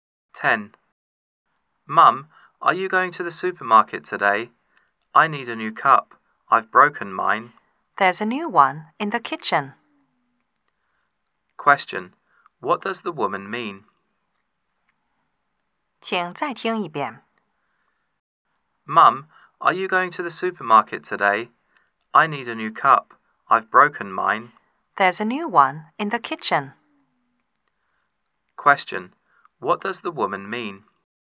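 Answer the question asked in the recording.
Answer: He doesn't need to buy a cup; there's a new one in the kitchen.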